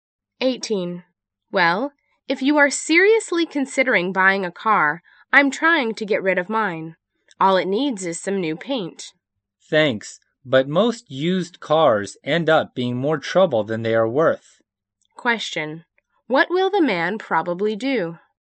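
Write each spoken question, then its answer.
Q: What will the man probably do?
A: Not buy the used car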